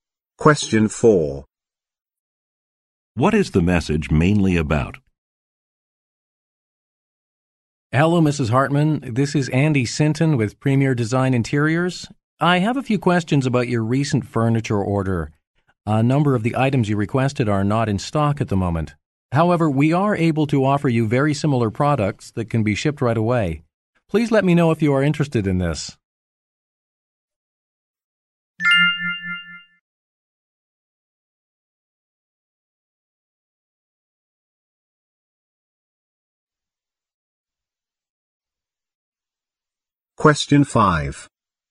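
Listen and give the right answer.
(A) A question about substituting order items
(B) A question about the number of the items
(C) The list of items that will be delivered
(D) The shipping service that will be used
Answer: (A) A question about substituting order items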